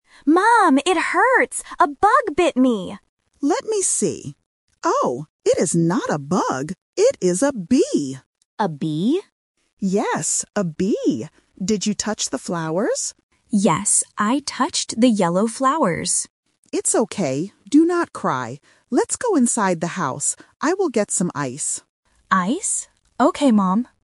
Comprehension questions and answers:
Listen to the conversation and choose the correct answer (A, B, or C).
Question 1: What insect bit the child?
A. A bug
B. A bee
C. A fly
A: B. A bee

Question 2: What color were the flowers?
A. Red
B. Yellow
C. Blue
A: B. Yellow

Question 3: What will the mother get for the child?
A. Water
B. Ice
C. The house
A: B. Ice

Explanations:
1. The mother looks and says, "It is a bee". Option (A) "A bug" is a trap because the child thinks it is a bug at first, but the mother corrects this: "it is not a bug." Option (C) is not mentioned.
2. The child explicitly states, "I touched the yellow flowers." Options (A) and (C) are colors but are not mentioned in the audio.
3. The mother promises, "I will get some ice." Option (A) "Water" is a plausible thing to get, but is not mentioned. Option (C) "The house" is a trap because the mother mentions going inside the house, but she is getting ice, not the house itself.

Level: A1

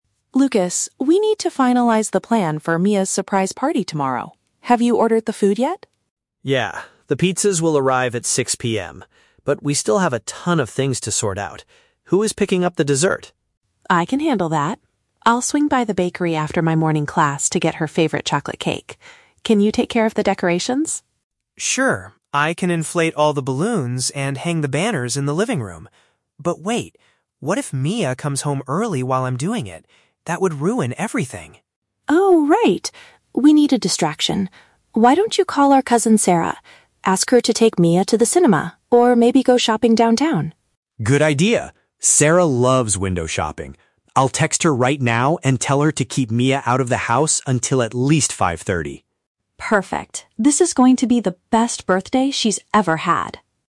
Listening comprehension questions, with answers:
Listen to a conversation between a brother and sister planning a party, and choose the correct answer (A, B, or C) for each question.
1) What is Emma's main responsibility for the party?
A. Ordering the main meal for the guests.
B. Purchasing the sweet treat from a local shop.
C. Setting up the colorful banners in the living area.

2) Why is Lucas concerned about preparing the living room?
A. He thinks inflating all the balloons will take too much time.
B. He does not have enough decorations to cover the walls.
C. He is afraid the birthday girl might return before he finishes.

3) What is their strategy to prevent Mia from discovering the surprise?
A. Asking her to attend an extra study class in the morning.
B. Having a family member take her out for some entertainment.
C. Sending her downtown to pick up some last-minute supplies.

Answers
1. B. Purchasing the sweet treat from a local shop.
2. C. He is afraid the birthday girl might return before he finishes.
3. B. Having a family member take her out for some entertainment.

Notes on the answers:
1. Emma says she will "get her favorite chocolate cake" at the "bakery". Option (B) uses synonyms ("sweet treat" = cake, "local shop" = bakery). Option (A) is a trap; Lucas is the one who ordered the pizzas (the main meal). Option (C) is also a trap; setting up the banners is Lucas's job.
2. Lucas asks, "what if Mia comes home early while I'm doing it? That would ruin everything!" Option (C) paraphrases this perfectly ("return" = come home, "before he finishes" = while I'm doing it). Option (A) is a trap; he mentions inflating balloons, but time is not his worry. Option (B) is a plausible guess but is never mentioned in the audio.
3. Emma suggests calling their "cousin, Sarah" (family member) to take Mia to the "cinema or maybe go shopping" (entertainment). Option (B) is the correct paraphrase. Option (A) is a trap; "morning class" is mentioned, but that is Emma's schedule, not Mia's. Option (C) is a trap; "downtown" is mentioned, but they are sending her there to keep her away, not to buy party supplies.

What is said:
Emma: Lucas, we need to finalize the plan for Mia's surprise party tomorrow. Have you ordered the food yet?
Lucas: Yeah, the pizzas will arrive at 6 PM. But we still have a ton of things to sort out. Who is picking up the dessert?
Emma: I can handle that. I'll swing by the bakery after my morning class to get her favorite chocolate cake. Can you take care of the decorations?
Lucas: Sure, I can inflate all the balloons and hang the banners in the living room. But wait... what if Mia comes home early while I'm doing it? That would ruin everything!
Emma: Oh, right. We need a distraction. Why don't you call our cousin, Sarah? Ask her to take Mia to the cinema or maybe go shopping downtown.
Lucas: Good idea! Sarah loves window shopping. I'll text her right now and tell her to keep Mia out of the house until at least 5:30.

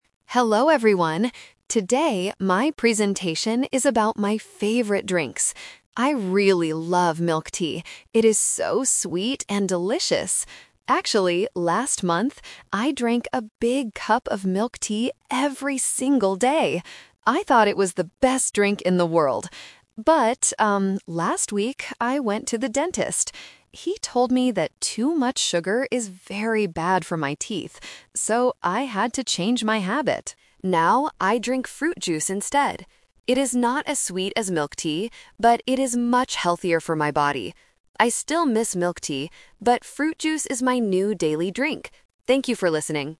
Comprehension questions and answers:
Listen to the student's presentation and choose the correct answer (A, B, or C).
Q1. What does the student say about milk tea?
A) It is very healthy.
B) It is sweet and delicious.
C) It is too expensive.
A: B) It is sweet and delicious.

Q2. Why did the student change her drinking habit?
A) She went to the dentist.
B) She learned how to make fruit juice.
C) She didn't like the taste of milk tea anymore.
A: A) She went to the dentist.

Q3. What does the student drink every day now?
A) Milk tea, because she loves it.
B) Fruit juice, because it is healthier.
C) She decides to drink only water.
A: B) Fruit juice, because it is healthier.

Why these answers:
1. The student clearly says that milk tea is "so sweet and delicious." Option A is a trap because fruit juice is the healthy drink, not milk tea. Option C is a plausible guess for a student's presentation, but the price is never mentioned.
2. The student explains that she went to the dentist and found out that too much sugar is bad for her teeth. Option B is plausible but not mentioned in the audio. Option C is a trap because she actually says she still misses milk tea (meaning she still likes the taste).
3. This question uses the "Twist" technique. The student originally drank milk tea every day because she loved it. However, after visiting the dentist, she changed her mind. She now drinks fruit juice because "it is much healthier." Option A is the main trap (her old habit). Option C is incorrect.

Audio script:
Student: Hello everyone. Today, my presentation is about my favorite drinks. I really love milk tea. It is so sweet and delicious. Actually, last month, I drank a big cup of milk tea every single day! I thought it was the best drink in the world. But, um, last week I went to the dentist. He told me that too much sugar is very bad for my teeth. So, I had to change my habit. Now, I drink fruit juice instead. It is not as sweet as milk tea, but it is much healthier for my body. I still miss milk tea, but fruit juice is my new daily drink. Thank you for listening.

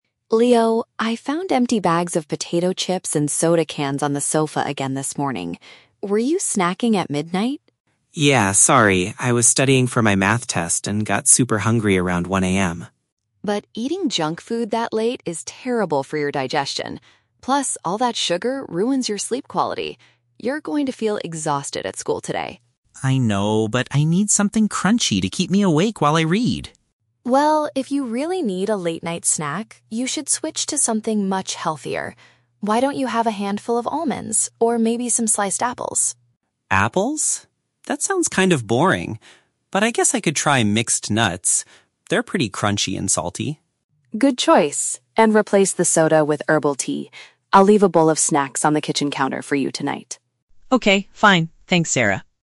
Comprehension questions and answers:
Listen to a conversation between a sister and her younger brother. For each question, choose the correct answer (A, B, or C).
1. How did Sarah know Leo was eating late at night?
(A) She heard him cooking food in the kitchen at 1 AM.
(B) She discovered the rubbish he left in the living room.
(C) She saw him buying unhealthy food at the supermarket.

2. Why was Leo staying up so late?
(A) He was watching a late-night television show on the sofa.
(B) He was reviewing materials for an upcoming school assessment.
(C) He was trying to finish a difficult project for his science class.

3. What does Leo finally agree to eat instead of his usual snack?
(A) A piece of fresh, sweet fruit.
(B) A crunchy type of healthy nut.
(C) A warm cup of herbal tea.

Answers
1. (B) She discovered the rubbish he left in the living room.
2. (B) He was reviewing materials for an upcoming school assessment.
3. (B) A crunchy type of healthy nut.

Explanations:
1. Sarah says she "found empty bags of potato chips and soda cans on the sofa" (which means she discovered his rubbish in the living room). Option (A) is a trap; the time "1 AM" is mentioned, but he wasn't cooking, he was eating snacks. Option (C) is never mentioned.
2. Leo explains that he was "studying for my math test," which means reviewing materials for a school assessment. Option (A) is a trap; he was on the "sofa", but he was not watching TV. Option (C) is a trap; he was studying math, not doing a science project.
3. Leo says, "I guess I could try mixed nuts. They're pretty crunchy." Option (A) is a trap; Sarah suggested "sliced apples" (fresh fruit), but Leo rejected it, saying "That sounds kind of boring." Option (C) is a trap; Sarah suggested herbal tea to drink instead of soda, but the question asks what he will eat.

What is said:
Sarah: Leo, I found empty bags of potato chips and soda cans on the sofa again this morning. Were you snacking at midnight?
Leo: Yeah, sorry. I was studying for my math test and got super hungry around 1 AM.
Sarah: But eating junk food that late is terrible for your digestion. Plus, all that sugar ruins your sleep quality. You're going to feel exhausted at school today.
Leo: I know, but I need something crunchy to keep me awake while I read!
Sarah: Well, if you really need a late-night snack, you should switch to something much healthier. Why don't you have a handful of almonds or maybe some sliced apples?
Leo: Apples? That sounds kind of boring. But I guess I could try mixed nuts. They're pretty crunchy and salty.
Sarah: Good choice. And replace the soda with herbal tea.

